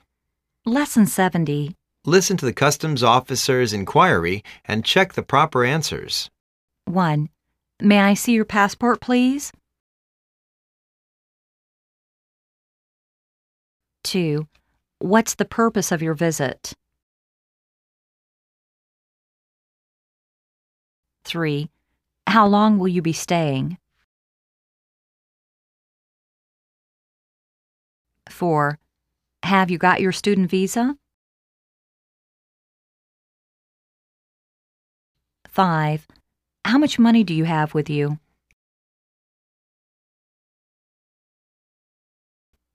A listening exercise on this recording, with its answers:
Listen to the customs officer's enquiry and check the proper answers.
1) May I see your passport, please?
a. Sure. Here we are.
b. Sure. Here you are.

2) What's the purpose of your visit?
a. l'm coming for study.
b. l'm coming soon.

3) How long will you be staying?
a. It won't be long.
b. I plan to stay for a year.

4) Have you got your student visa?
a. Yes. I have a student visa for a 10 months master course.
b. Yes. I have a visa card.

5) How much money do you have with you?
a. I have 2000 US dollars and a traveler check of 15000 US dollars.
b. I have some money in my pocket.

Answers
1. b. Sure. Here you are.
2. a. l'm coming for study.
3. b. I plan to stay for a year.
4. a. Yes. I have a student visa for a 10 months master course.
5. a. I have 2000 US dollars and a traveler check of 15000 US dollars.

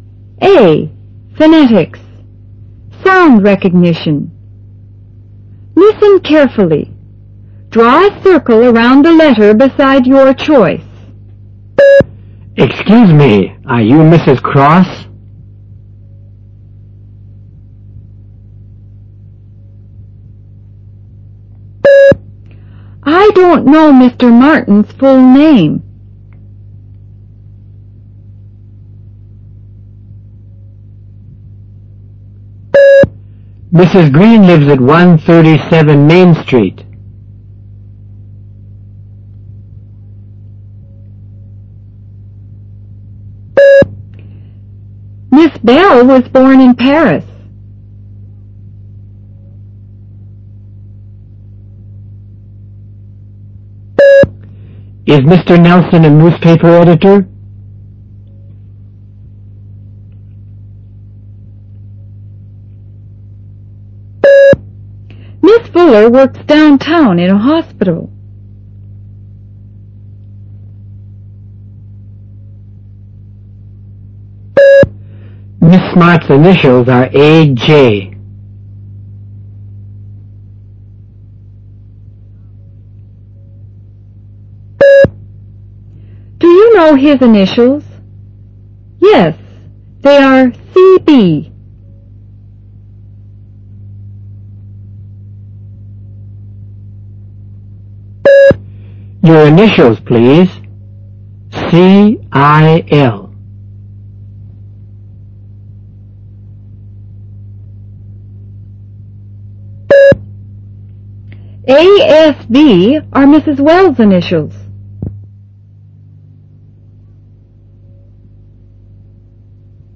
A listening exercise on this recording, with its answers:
Directions:Liston carefully. Draw a circle around the letter beside your choice.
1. Excuse me. Are you ...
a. Mr. Cross?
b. Mrs. Cross?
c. Miss Cross?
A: b. Mrs. Cross?

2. I don't know ... full name.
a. Mr. Martin's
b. Mrs. Martin's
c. Miss Martin's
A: a. Mr. Martin's

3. ... lives at 137 Main Street.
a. Mr. Green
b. Mrs. Green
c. Miss Green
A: b. Mrs. Green

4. ... was born in Paris.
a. Mr. Bell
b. Mrs. Bell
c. Miss Bell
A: c. Miss Bell

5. Is ... a newspaper editor?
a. Mr. Nelson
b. Mrs. Nelson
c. Miss Nelson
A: a. Mr. Nelson

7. Miss Smart's initials are ...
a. A.J.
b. A.G.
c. K.J.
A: a. A.J.

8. --Yes. They are...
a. C.D.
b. C.B.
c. T.B.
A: b. C.B.

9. --Your initials, please?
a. C.R.L.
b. C.I.L.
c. G.R.N.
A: b. C.I.L.

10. ... are Mrs. Wells' initials.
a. J.S.E.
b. A.S.E.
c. A.S.V.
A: c. A.S.V.

